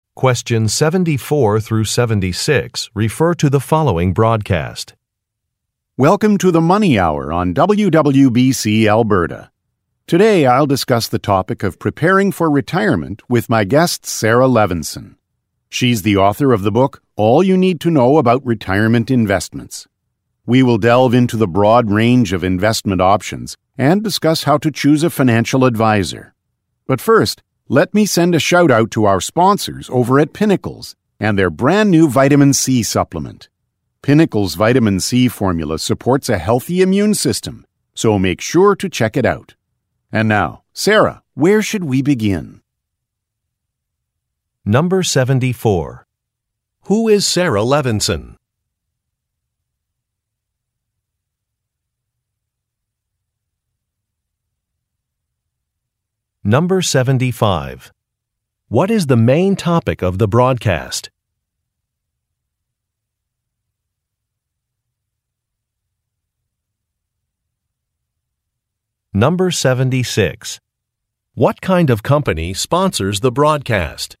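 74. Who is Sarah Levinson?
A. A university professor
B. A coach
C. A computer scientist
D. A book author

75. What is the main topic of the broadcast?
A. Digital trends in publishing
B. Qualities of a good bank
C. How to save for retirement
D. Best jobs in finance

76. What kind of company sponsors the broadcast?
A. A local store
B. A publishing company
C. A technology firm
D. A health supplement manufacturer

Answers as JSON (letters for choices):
{"74": "D", "75": "C", "76": "D"}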